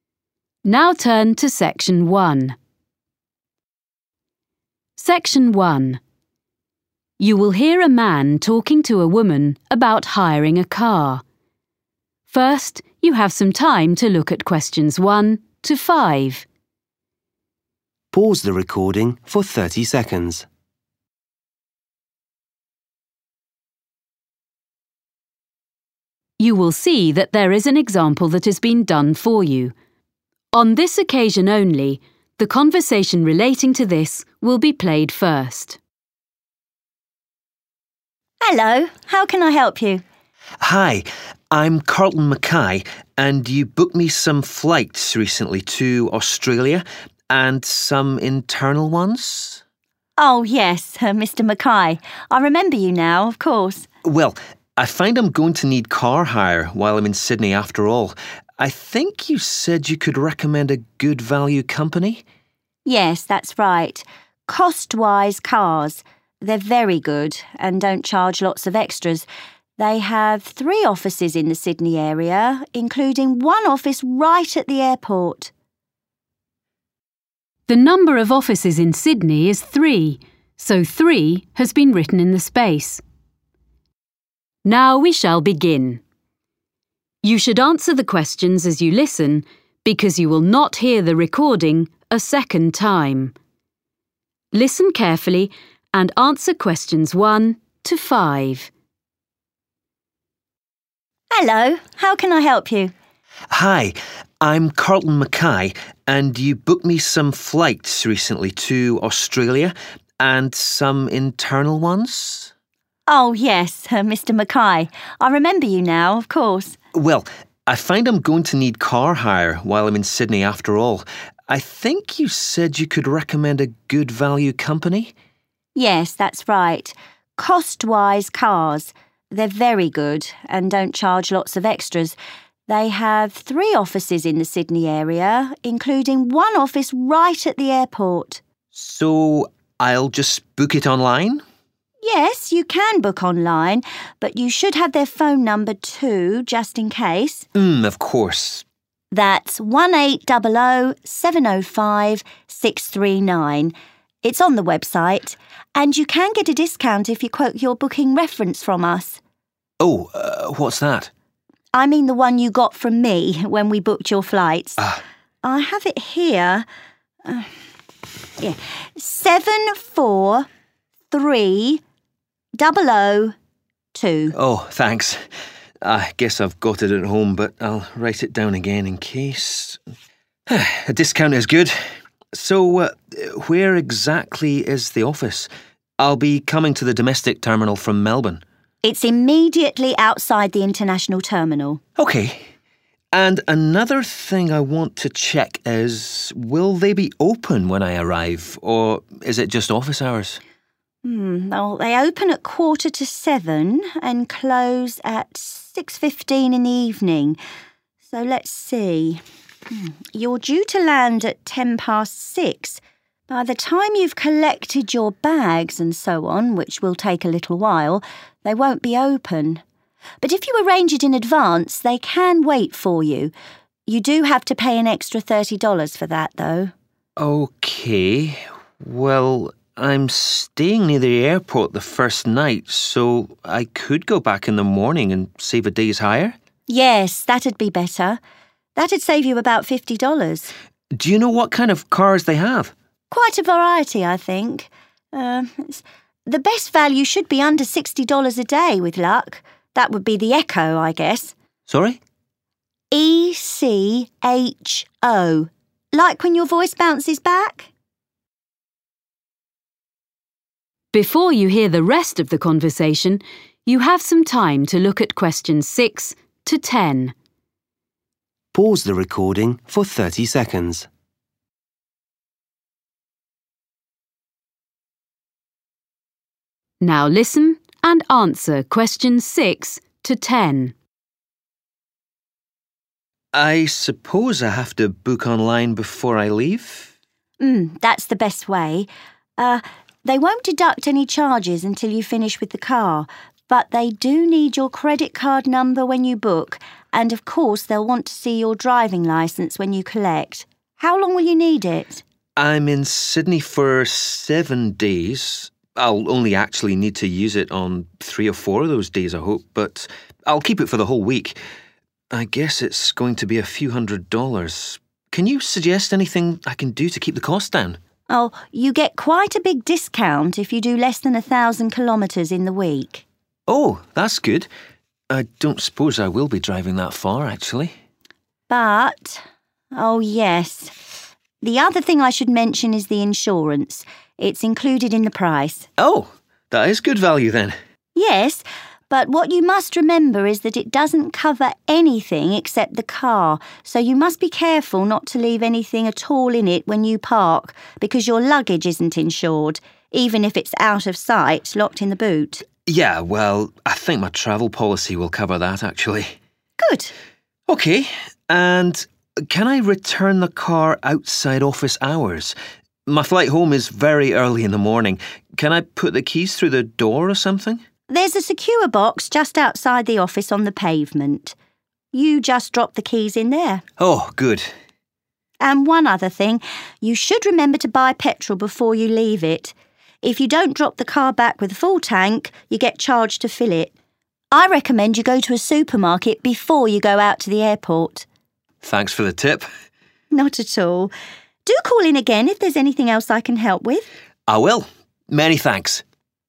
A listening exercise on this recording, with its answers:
Questions 1-10. Complete the notes below. Write NO MORE THAN TWO WORDS AND/OR A NUMBER for each answer.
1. Booking reference number: 1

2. Office just by 2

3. Opening hours: 3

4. to 4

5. After-hours charge: 5$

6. Cheapest model of car available: 6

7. Information needed when booking: 7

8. number Length of hire period: 8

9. Reduce cost by driving under 9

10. Insurance does not cover: 10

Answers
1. 743002
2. international
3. 6.45
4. 6.15/6.15 p.m.
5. thirty
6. Echo
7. credit card
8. seven
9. 1,000
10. luggage

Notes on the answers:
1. I have it here – 743002. [Tôi có nó ở đây – 743002]
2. It's immediately outside the international terminal. [Nó ngay bên ngoài nhà ga quốc tế.]
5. By the time you've collected your bags and so on, which will take a little while, they won't be open, but if you arrange it in advance, they can wait for you (= after hours). You do have to pay an extra $30 for that, though. [Đến khi bạn lấy hành lý, v.v., sẽ hơi lâu, họ sẽ không còn mở cửa, nhưng nếu bạn sắp xếp trước, họ có thể đợi bạn. Tuy nhiên, bạn phải trả thêm $30 cho việc đó]
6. the best value (= cheapest) should be under $60 a day with luck. That would be the 'Echo'. [giá tốt nhất sẽ là dưới 60 đô la một ngày nếu may mắn. Đó sẽ là dòng xe 'Echo']
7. Er, they won't deduct any charges until you finish with the car, but they do need your credit card number when you book [Ồ, họ sẽ không khấu trừ bất kỳ khoản phí nào cho đến khi bạn hoàn thành việc lấy xe, nhưng họ cần số thẻ tín dụng của bạn khi bạn đặt xe]
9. Oh, you get quite a big discount if you do less than (= reduce cost by driving under) 1,000 kilometres in the week. [Ồ, bạn được giảm giá khá nhiều nếu bạn đi ít hơn 1.000 km trong tuần.]